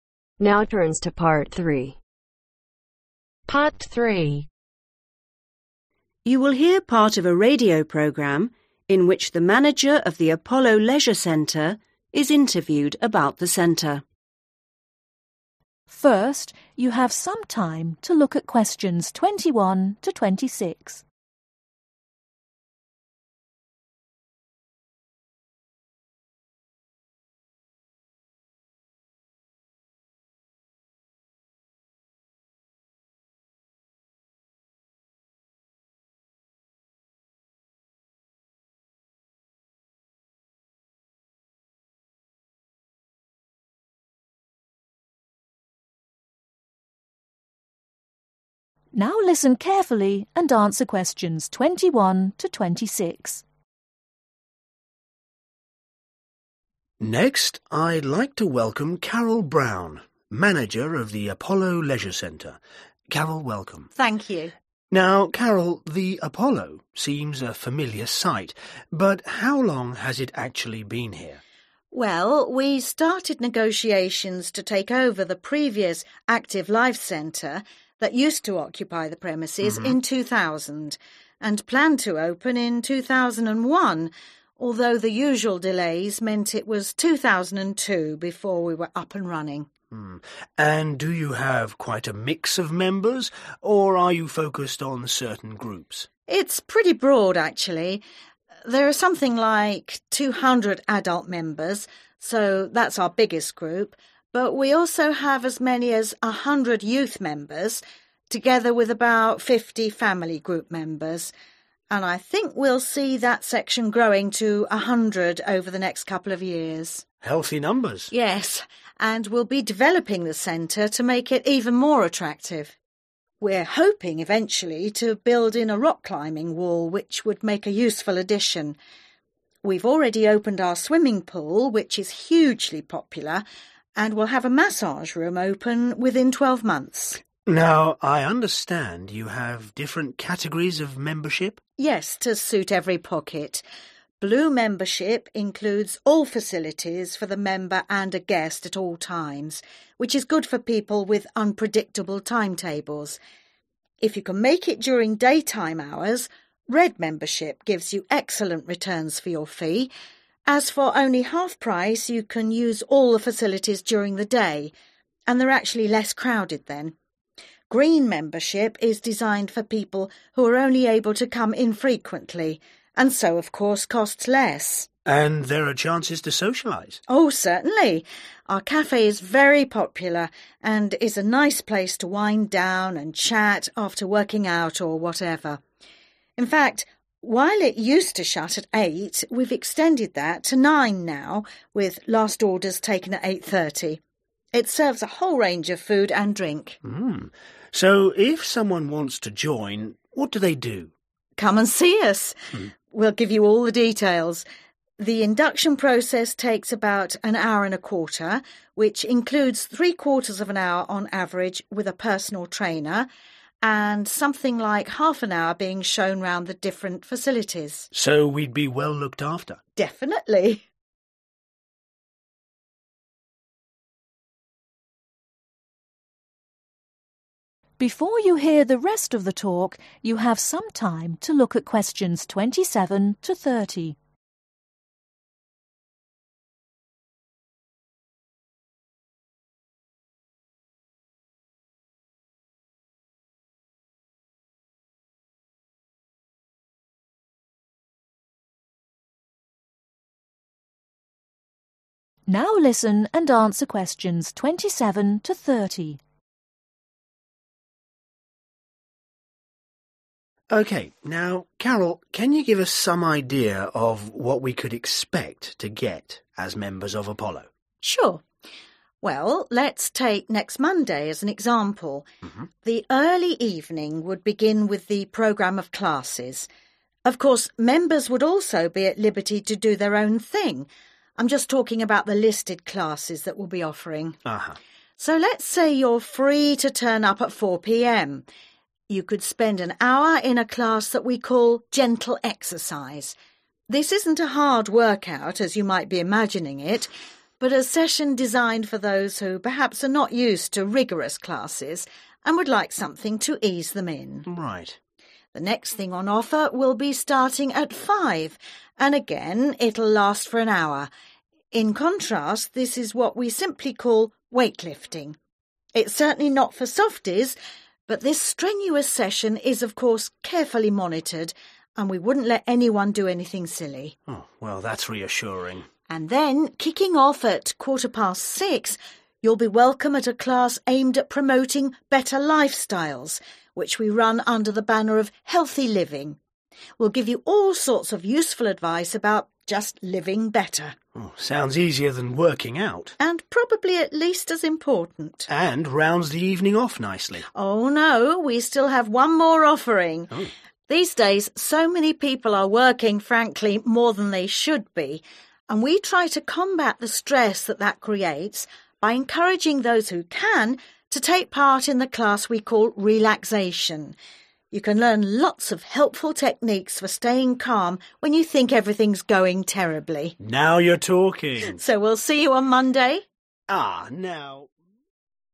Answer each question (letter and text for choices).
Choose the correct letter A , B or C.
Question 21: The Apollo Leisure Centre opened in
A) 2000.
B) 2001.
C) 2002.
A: C) 2002.

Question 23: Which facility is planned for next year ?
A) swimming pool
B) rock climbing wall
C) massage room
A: C) massage room

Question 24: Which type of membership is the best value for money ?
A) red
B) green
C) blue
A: A) red

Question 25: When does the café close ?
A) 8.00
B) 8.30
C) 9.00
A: C) 9.00

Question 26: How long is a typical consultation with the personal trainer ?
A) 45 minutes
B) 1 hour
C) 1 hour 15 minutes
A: A) 45 minutes

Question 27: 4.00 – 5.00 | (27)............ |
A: Gentle exercise

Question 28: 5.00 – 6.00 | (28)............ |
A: Weight lifting

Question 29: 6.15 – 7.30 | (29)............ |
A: Healthy Living

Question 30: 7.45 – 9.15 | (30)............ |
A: Relaxation